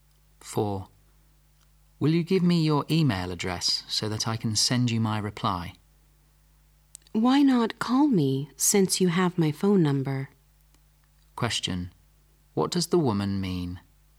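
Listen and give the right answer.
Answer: She'd rather the man phone her than email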